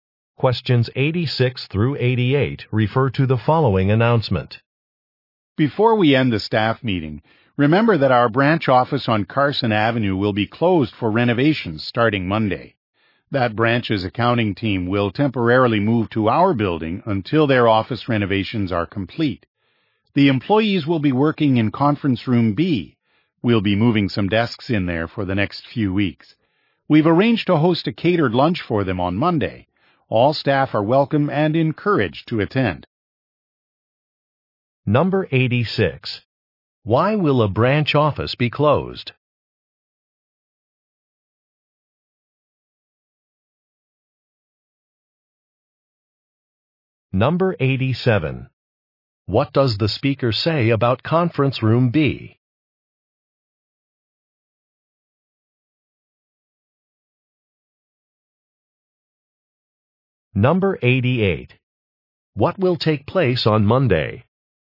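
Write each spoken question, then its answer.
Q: Why will a branch office be closed?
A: For renovations

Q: What does the speaker say about Conference Room B?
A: The accounting team will work there temporarily

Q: What will take place on Monday?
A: A catered lunch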